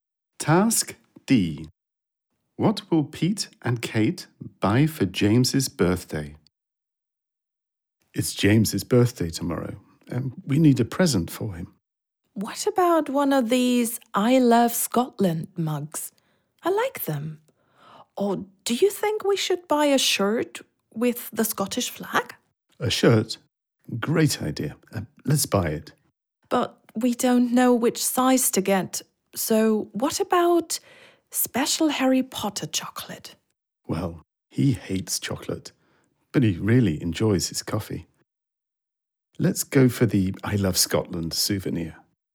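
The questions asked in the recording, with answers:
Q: What will Pete and Kate buy for James's birthday?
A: An I Love Scotland mug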